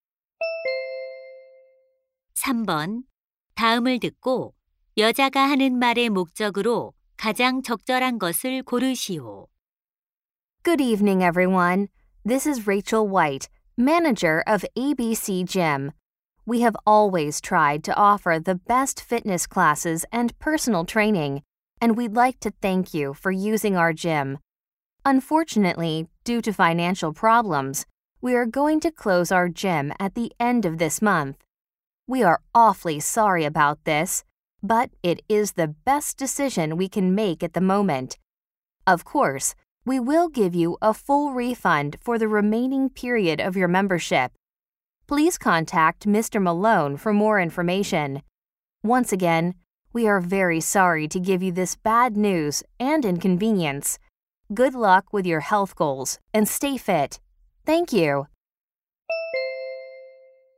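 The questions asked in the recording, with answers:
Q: 다음을 듣고 여자가 하는 말의 목적으로 가장 적절한 것을 고르시오.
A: 체육관 폐업을 알리려고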